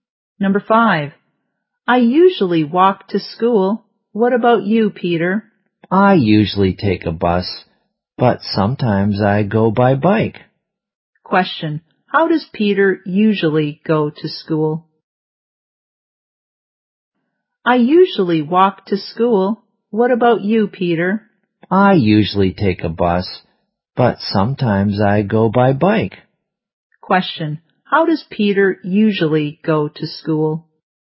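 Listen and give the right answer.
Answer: By bus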